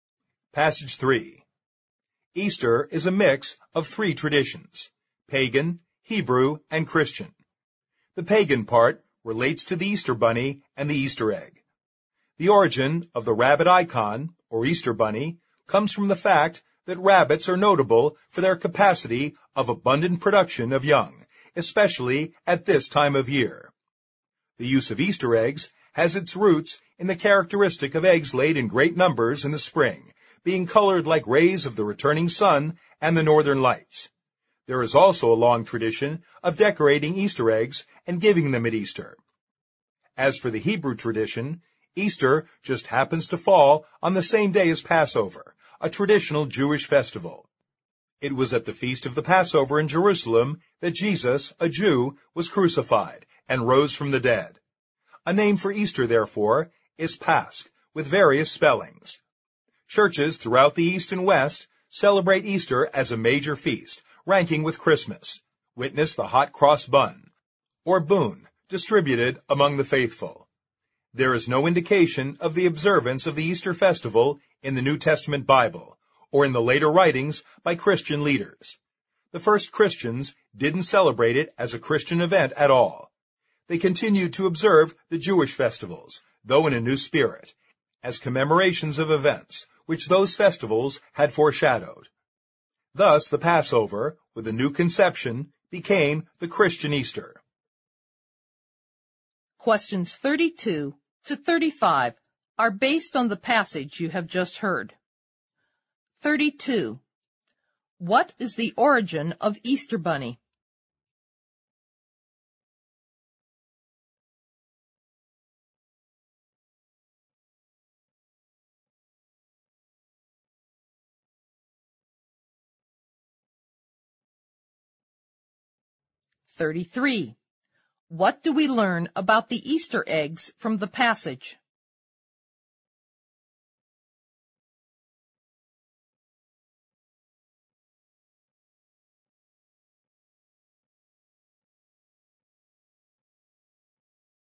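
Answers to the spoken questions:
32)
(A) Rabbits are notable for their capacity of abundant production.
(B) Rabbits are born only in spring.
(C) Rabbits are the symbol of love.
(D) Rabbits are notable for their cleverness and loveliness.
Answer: (A) Rabbits are notable for their capacity of abundant production.
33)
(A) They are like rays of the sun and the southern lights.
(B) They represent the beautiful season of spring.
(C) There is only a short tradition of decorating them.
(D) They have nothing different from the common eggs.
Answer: (B) They represent the beautiful season of spring.

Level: 六级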